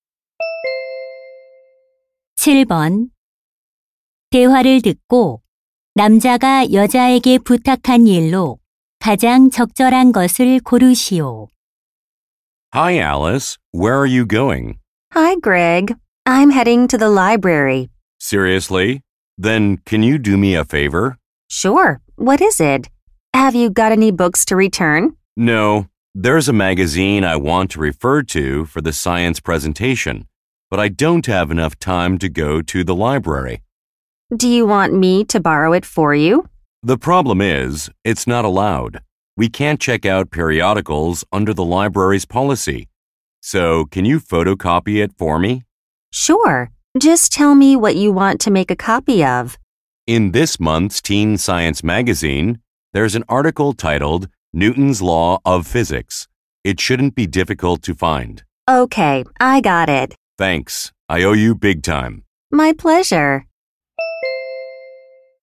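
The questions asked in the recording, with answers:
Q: 7번대화를듣고남자가여자에게부탁한일로가장적절한것을고르시오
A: 잡지 기사 복사하기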